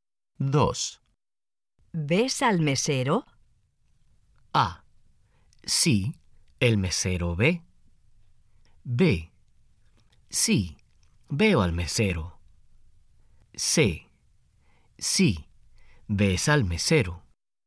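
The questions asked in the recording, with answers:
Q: ¿Ves al mesero?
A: B: Sí, veo al mesero.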